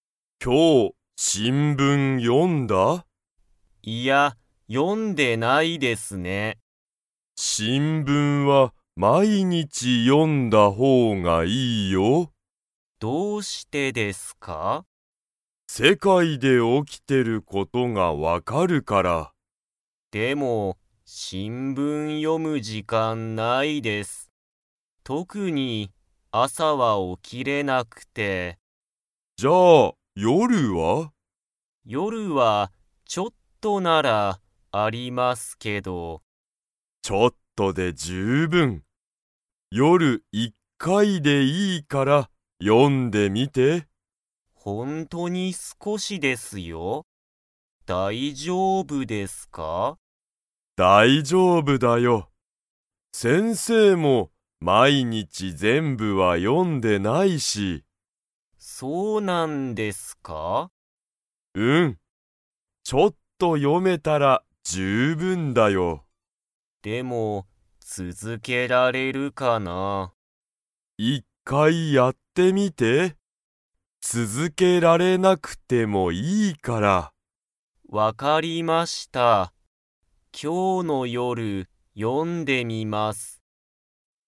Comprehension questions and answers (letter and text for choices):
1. ツヨシは朝あさ 。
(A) 起おきれる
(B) 起おきれない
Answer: (B) 起おきれない

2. ツヨシはいつ、新聞しんぶんを読よんでみますか?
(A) 今日きょうの朝あさ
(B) 今日きょうの夜よる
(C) 明日あしたの朝あさ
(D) 明日あしたの夜よる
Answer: (B) 今日きょうの夜よる

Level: Level 3